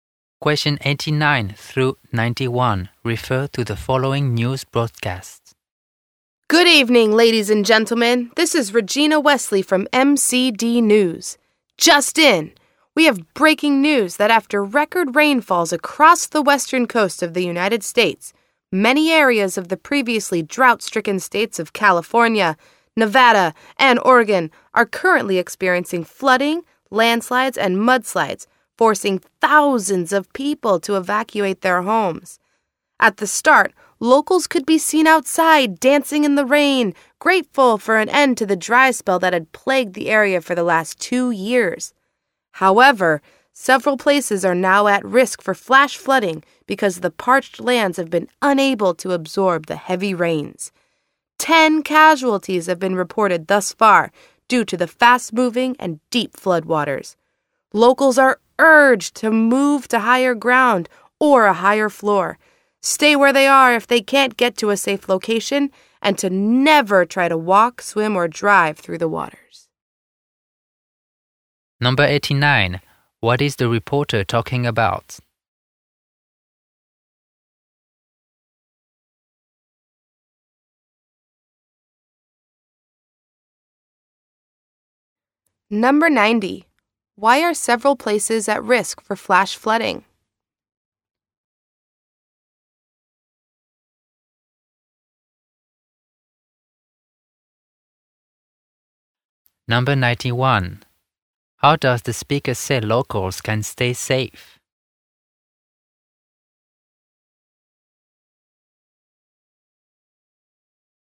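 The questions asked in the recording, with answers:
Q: What is the reporter talking about?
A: Flooding and landslides after record rainfall on the U.S. west coast

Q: Why are several places at risk for flash flooding?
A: The dry land can't absorb the heavy rain

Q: How does the speaker say locals can stay safe?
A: Move to higher ground and never walk, swim or drive through floodwater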